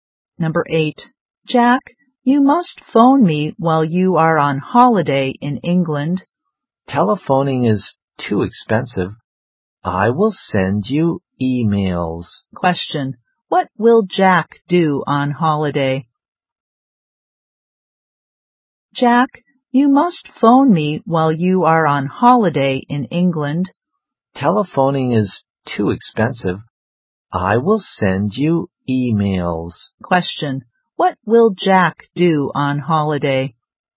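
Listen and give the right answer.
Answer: Send emails.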